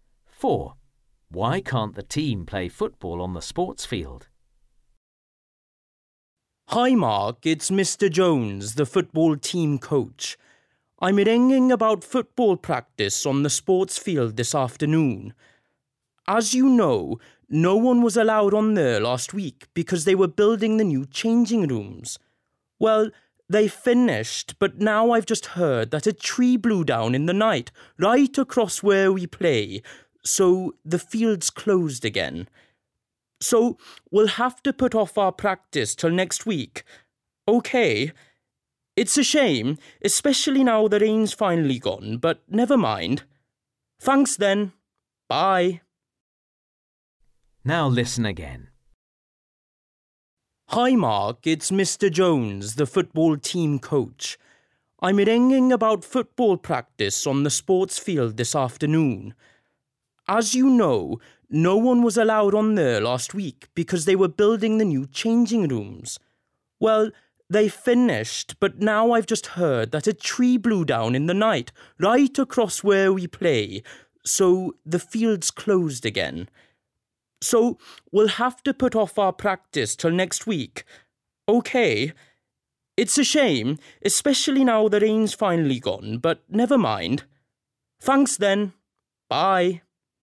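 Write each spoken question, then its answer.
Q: Why can't the team play football on the sports field?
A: A tree blew down across the field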